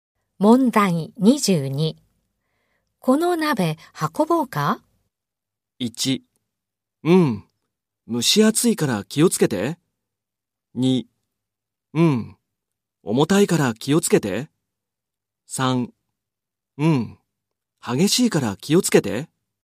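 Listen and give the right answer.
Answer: 2: うん、重たいから気をつけて。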